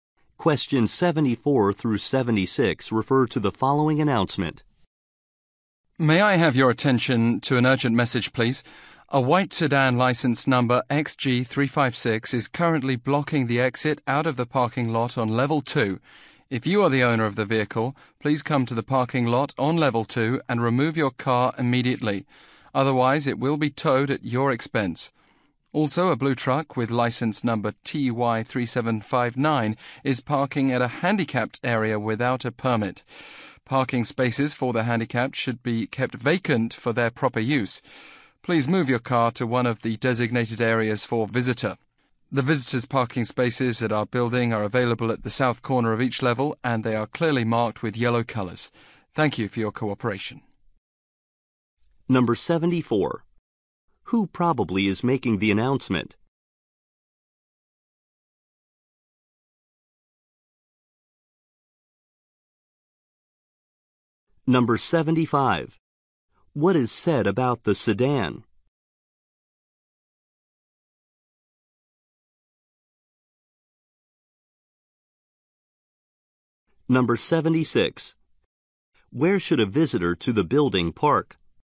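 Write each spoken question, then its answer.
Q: What is said about the sedan?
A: It is blocking the parking lot exit on level 2

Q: Where should a visitor to the building park?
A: At the south corner of each level, marked in yellow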